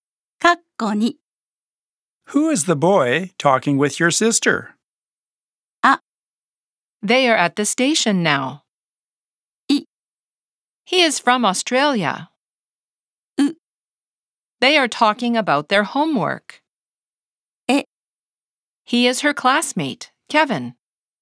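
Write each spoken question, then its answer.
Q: Who is the boy talking with your sister?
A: え: He is her classmate, Kevin.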